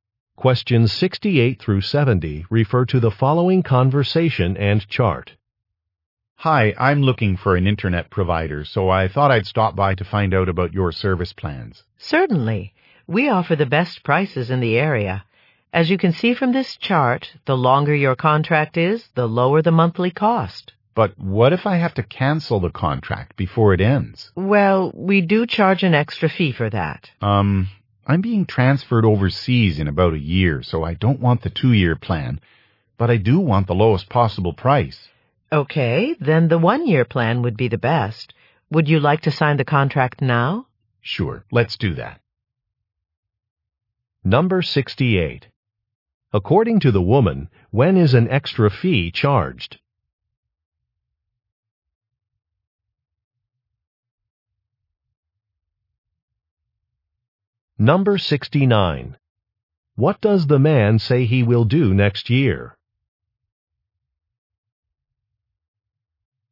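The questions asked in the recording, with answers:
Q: According to the woman, when is an extra fee charged?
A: When a contract is canceled early

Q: What does the man say he will do next year?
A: Be transferred overseas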